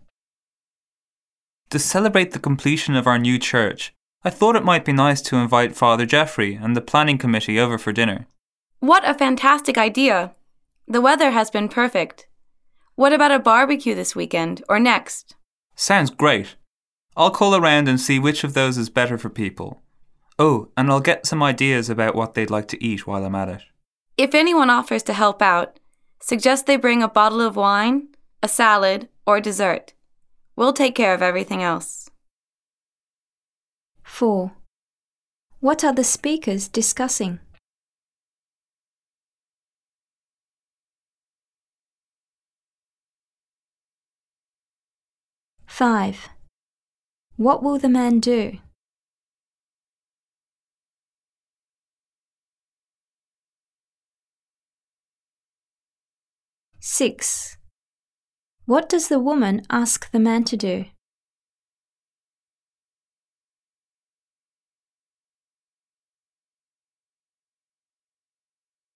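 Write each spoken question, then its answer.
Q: What are the speakers discussing?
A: Holding a dinner (barbecue) to celebrate the completion of their new church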